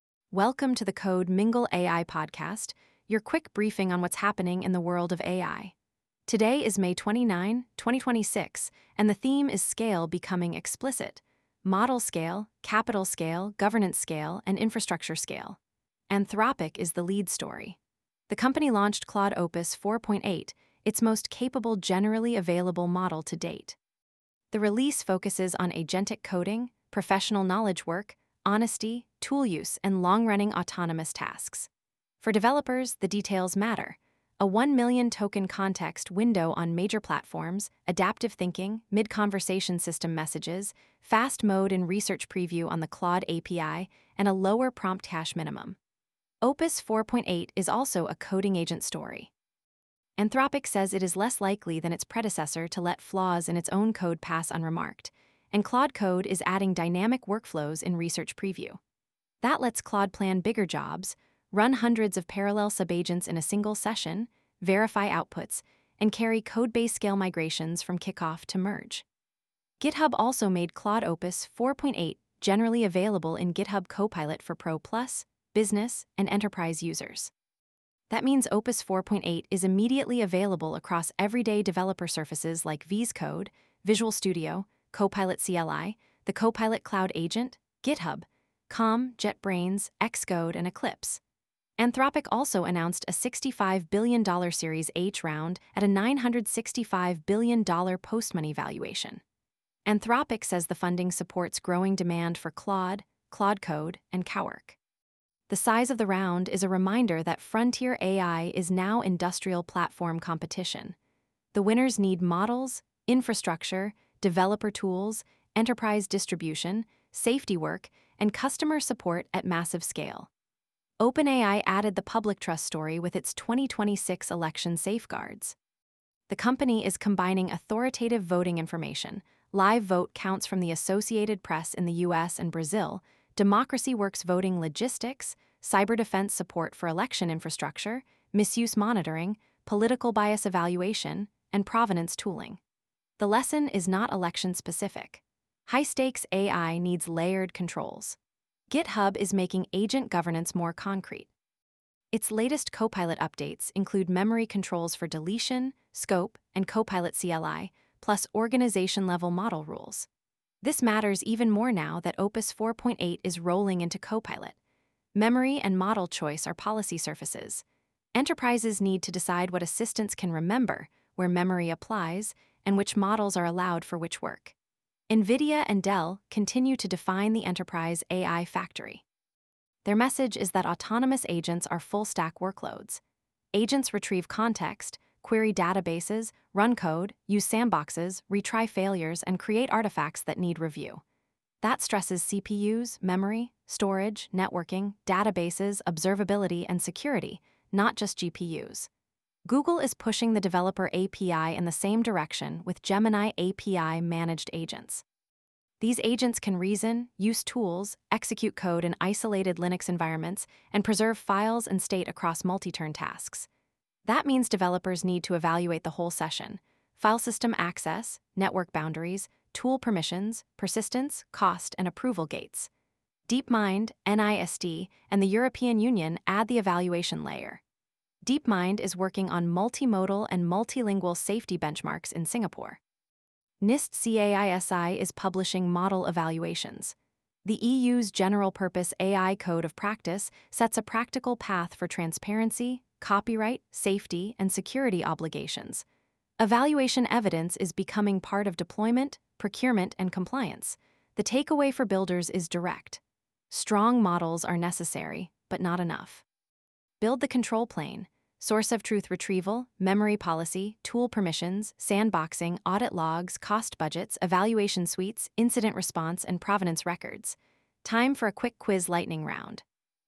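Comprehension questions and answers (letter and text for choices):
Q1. What is the main significance of Anthropic's Claude Opus 4.8 launch?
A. It raises the bar for long-running agentic coding, tool use, and high-autonomy professional work.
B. It removes the need for prompt and tool-call regression tests.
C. It is only a consumer chatbot redesign.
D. It disables long-context workflows.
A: A. It raises the bar for long-running agentic coding, tool use, and high-autonomy professional work.

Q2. Why is OpenAI's 2026 election safeguards post useful for builders outside politics?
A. It provides a reusable layered-integrity pattern for high-stakes domains.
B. It shows one mitigation is always enough.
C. It argues against using authoritative sources.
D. It removes the need for abuse monitoring.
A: A. It provides a reusable layered-integrity pattern for high-stakes domains.

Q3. What governance issue is highlighted by GitHub's Copilot Memory controls?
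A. Agent memory should have scope, deletion, retention, review, and audit semantics.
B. Agent memory should be invisible and impossible to delete.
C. Memory is unrelated to privacy or compliance.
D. All organizations should share one global memory store.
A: A. Agent memory should have scope, deletion, retention, review, and audit semantics.

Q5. Why are DeepMind, NIST, and EU evaluation efforts important for AI deployment?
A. They show evaluation evidence is moving into procurement, compliance, and deployment decisions.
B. They prove generic benchmark tables are always sufficient.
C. They apply only to research labs.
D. They make product-specific testing optional.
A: A. They show evaluation evidence is moving into procurement, compliance, and deployment decisions.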